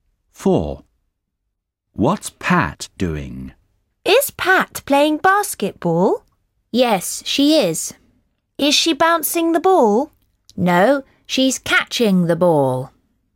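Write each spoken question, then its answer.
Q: What's Pat doing?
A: Catching the ball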